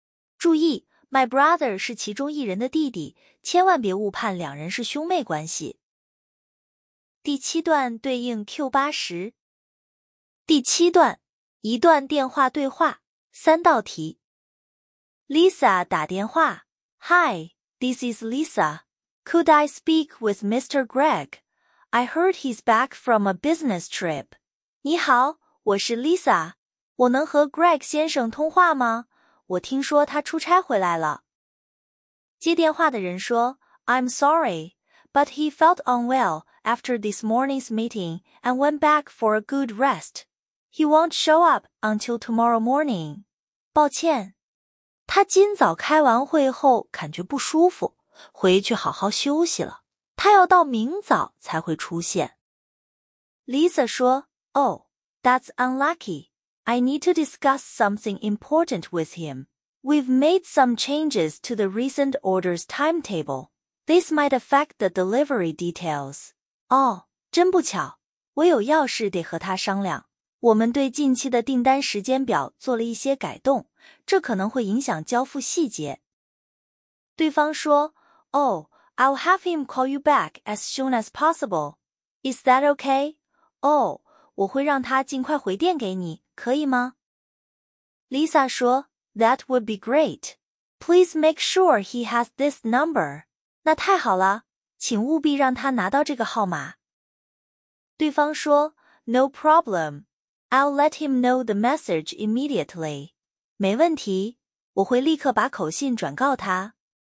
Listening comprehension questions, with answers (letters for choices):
第二节 听 5 段对话/独白,每段读两遍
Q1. Where is Mr. Greg most likely at the moment?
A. On a business trip.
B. In a meeting.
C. At home.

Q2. What does Lisa need to talk to Mr. Greg about?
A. New products.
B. Payment details.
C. Schedule changes.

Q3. What is the man probably going to do next?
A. Pass on the message.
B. Review the timetable.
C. Check a phone number.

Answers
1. C
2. C
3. A

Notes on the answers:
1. 出差(A)、开会(B)都是干扰,went back for a good rest → 在家休息 → C。
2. changes to the orders timetable = 时间表变动 → Schedule changes。
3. 他承诺的下一步动作是 "let him know the message" = 转告;timetable、number 都是干扰。

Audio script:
Q7. What is the relationship between the speakers? 说话者之间是什么关系? 答案 A
A. School friends. 同校同学 B. Brother and sister. 兄妹 C. Teacher and student. 师生
抓分:两人各属不同班级、同一所学校(my class / our school)→ 同学。"my brother" 是其中一人的弟弟,别误判两人是兄妹。
Lisa: Hi, this is Lisa. Could I speak with Mr. Greg? I heard he's back from a business trip.
你好,我是 Lisa。我能和 Greg 先生通话吗?我听说他出差回来了。
M: I'm sorry, but he felt unwell after this morning's meeting and went back for a good rest. He won't show up until tomorrow morning.
抱歉,他今早开完会后感觉不舒服,回去好好休息了。他要到明早才会出现。
Lisa: Oh, that's unlucky. I need to discuss something important with him. We've made some changes to the recent orders timetable. This might affect the delivery details.
哦,真不巧。我有要事得和他商量。我们对近期的订单时间表做了一些改动,这可能会影响交付细节。
M: Oh, I'll have him call you back as soon as possible. Is that okay?
哦,我会让他尽快回电给你,可以吗?
Lisa: That would be great. Please make sure he has this number.
那太好了。请务必让他拿到这个号码。
M: No problem. I'll let him know the message immediately.
没问题,我会立刻把口信转告他。
Q8. Where is Mr. Greg most likely at the moment? Greg 先生此刻最可能在哪里? 答案 C

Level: 高中